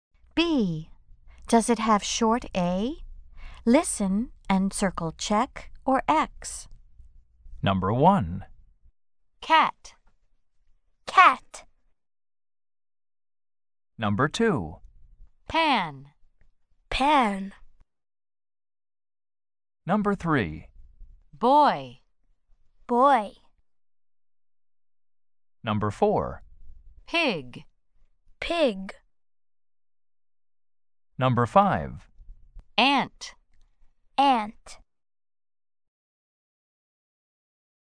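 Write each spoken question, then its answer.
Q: Does it have short A?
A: Yes (cat)

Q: Does it have short A?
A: Yes (pan)

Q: Does it have short A?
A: No (boy)

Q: Does it have short A?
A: No (pig)

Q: Does it have short A?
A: Yes (ant)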